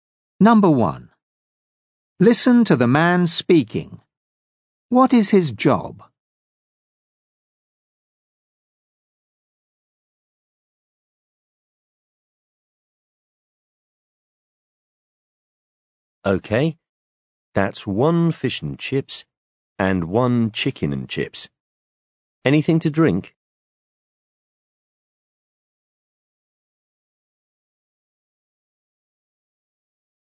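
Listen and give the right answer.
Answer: a waiter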